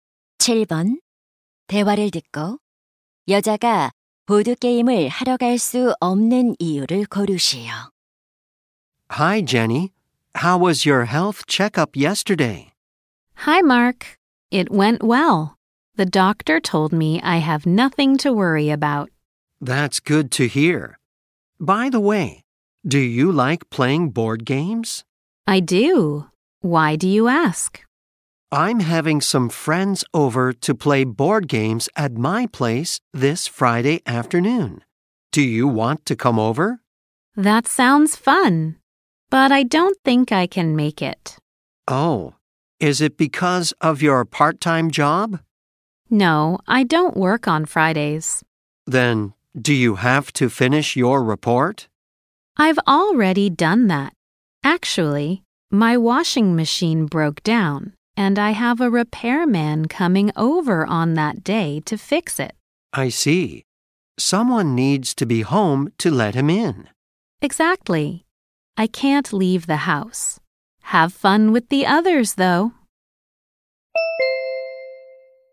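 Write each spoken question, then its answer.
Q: 대화를 듣고 여자가 보드 게임을 하러 갈 수 없는 이유를 고르시오.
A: 세탁기 수리 기사가 방문하기로 해서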